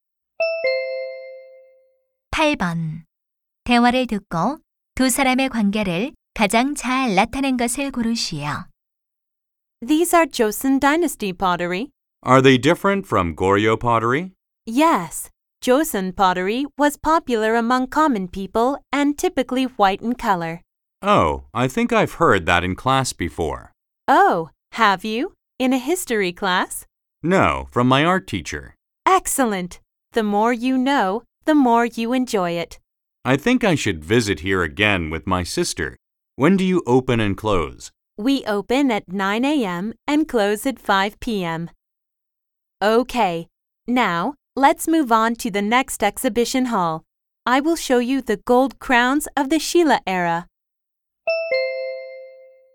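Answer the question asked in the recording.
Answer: 박물관 안내원과 관람객(학생)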